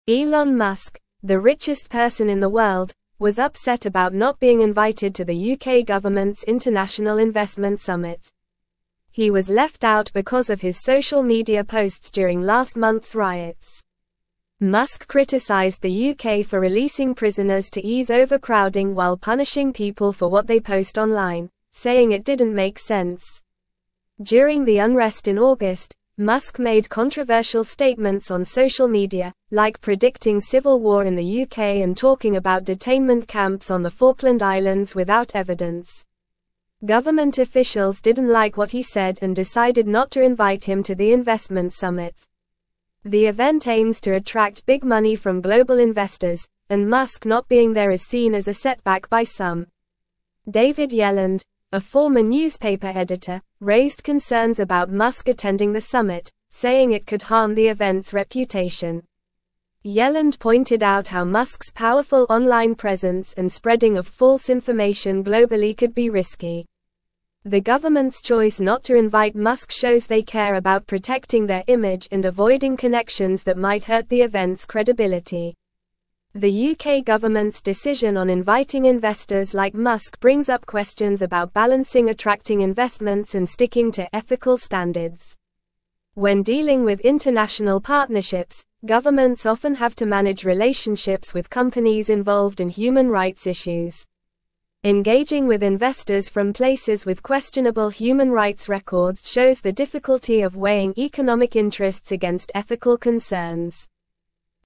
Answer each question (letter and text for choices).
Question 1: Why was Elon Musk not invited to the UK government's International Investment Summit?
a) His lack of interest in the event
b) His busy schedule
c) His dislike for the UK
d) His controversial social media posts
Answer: d) His controversial social media posts

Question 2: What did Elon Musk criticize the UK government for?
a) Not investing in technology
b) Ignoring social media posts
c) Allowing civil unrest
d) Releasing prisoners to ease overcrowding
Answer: d) Releasing prisoners to ease overcrowding

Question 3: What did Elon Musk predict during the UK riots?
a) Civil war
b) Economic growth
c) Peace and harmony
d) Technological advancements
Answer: a) Civil war

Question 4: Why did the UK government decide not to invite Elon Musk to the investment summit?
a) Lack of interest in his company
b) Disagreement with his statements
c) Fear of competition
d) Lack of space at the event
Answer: b) Disagreement with his statements

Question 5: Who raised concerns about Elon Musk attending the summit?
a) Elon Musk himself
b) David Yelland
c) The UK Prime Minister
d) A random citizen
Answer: b) David Yelland

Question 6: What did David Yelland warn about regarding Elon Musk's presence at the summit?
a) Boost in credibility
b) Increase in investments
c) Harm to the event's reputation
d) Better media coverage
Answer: c) Harm to the event's reputation

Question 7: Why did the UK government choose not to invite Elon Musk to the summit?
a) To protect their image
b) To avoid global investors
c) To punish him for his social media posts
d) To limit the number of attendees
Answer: a) To protect their image

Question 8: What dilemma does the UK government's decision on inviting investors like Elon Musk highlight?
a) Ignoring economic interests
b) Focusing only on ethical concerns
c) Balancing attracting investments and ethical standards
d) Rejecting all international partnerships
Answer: c) Balancing attracting investments and ethical standards

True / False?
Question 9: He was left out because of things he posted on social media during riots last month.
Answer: True

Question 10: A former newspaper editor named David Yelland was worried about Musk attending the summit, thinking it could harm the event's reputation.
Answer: True

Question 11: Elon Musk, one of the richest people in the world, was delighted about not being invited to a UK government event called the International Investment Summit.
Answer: False

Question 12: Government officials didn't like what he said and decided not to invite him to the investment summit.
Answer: True

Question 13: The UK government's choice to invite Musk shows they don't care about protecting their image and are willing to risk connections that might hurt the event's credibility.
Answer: False

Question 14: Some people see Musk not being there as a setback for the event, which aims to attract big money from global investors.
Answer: True

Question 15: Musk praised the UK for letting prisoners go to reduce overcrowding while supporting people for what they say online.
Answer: False

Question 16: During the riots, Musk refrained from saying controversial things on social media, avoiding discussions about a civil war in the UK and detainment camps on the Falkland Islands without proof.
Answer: False

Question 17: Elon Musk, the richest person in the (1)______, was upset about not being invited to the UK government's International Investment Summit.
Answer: world

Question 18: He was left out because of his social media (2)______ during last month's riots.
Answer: posts

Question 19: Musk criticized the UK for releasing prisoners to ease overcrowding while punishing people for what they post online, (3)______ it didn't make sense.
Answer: saying

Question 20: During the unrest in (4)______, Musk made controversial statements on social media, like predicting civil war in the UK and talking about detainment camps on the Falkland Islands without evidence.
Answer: August

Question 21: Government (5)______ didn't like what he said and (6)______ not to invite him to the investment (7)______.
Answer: officials

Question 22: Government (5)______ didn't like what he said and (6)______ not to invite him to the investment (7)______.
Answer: decided

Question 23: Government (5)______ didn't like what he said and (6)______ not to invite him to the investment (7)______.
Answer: summit

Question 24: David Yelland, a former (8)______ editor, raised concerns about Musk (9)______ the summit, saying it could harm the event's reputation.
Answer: newspaper

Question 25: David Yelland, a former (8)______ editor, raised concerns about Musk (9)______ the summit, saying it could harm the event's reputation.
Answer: attending

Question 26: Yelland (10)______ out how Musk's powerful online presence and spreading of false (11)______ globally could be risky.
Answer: pointed

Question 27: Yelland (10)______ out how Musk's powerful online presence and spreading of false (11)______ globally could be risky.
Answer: information

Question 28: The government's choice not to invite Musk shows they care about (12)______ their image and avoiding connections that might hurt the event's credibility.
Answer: protecting

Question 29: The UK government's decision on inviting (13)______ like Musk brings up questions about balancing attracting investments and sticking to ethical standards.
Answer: investors

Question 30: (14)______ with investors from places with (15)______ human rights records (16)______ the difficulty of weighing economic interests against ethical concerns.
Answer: Engaging

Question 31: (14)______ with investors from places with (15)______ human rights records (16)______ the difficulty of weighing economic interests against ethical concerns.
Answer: questionable

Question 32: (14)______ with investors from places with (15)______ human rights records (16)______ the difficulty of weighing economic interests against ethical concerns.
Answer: shows

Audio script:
Elon Musk, the richest person in the world, was upset about not being invited to the UK government's International Investment Summit. He was left out because of his social media posts during last month's riots. Musk criticized the UK for releasing prisoners to ease overcrowding while punishing people for what they post online, saying it didn't make sense.
During the unrest in August, Musk made controversial statements on social media, like predicting civil war in the UK and talking about detainment camps on the Falkland Islands without evidence. The event aims to attract big money from global investors, and Musk not being there is seen as a setback by some.
David Yelland, a former newspaper editor, raised concerns about Musk attending the summit, saying it could harm the event's reputation. Yelland pointed out how Musk's powerful online presence and spreading of false information globally could be risky. The government's choice not to invite Musk shows they care about protecting their image and avoiding connections that might hurt the event's credibility.
The UK government's decision on inviting investors like Musk brings up questions about balancing attracting investments and sticking to ethical standards. When dealing with international partnerships, governments often have to manage relationships with companies involved in human rights issues. Engaging with investors from places with questionable human rights records shows the difficulty of weighing economic interests against ethical concerns.

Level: Level 3